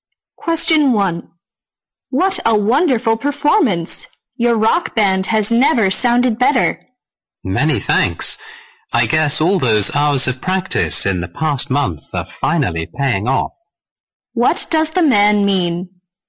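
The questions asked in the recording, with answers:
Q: What does the man mean?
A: The band's long practice has paid off.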